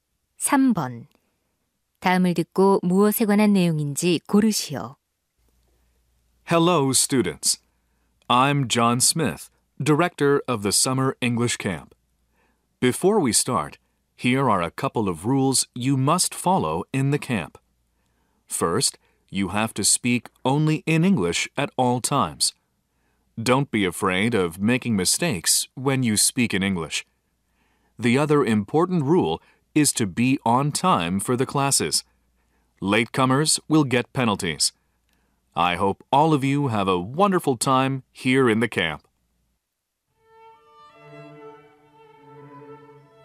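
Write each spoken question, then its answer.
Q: 다음을 듣고 무엇에 관한 내용인지 고르시오.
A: 여름 영어 캠프의 규칙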